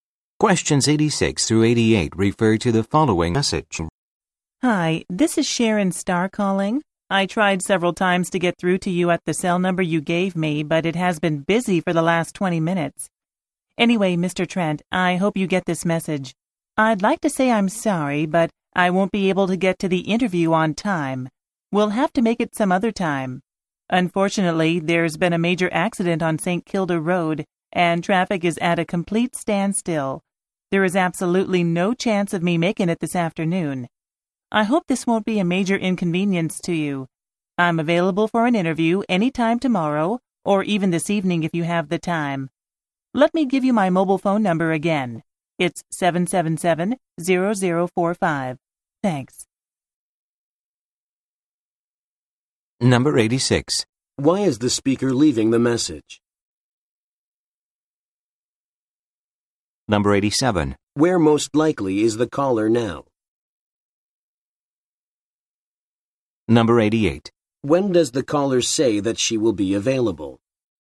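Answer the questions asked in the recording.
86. She cannot get to the interview on time
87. Stuck in traffic on St. Kilda Road
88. Anytime tomorrow or this evening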